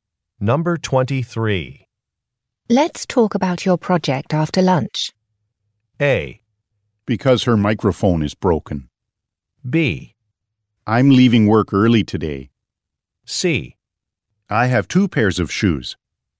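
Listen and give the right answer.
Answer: B: I'm leaving work early today.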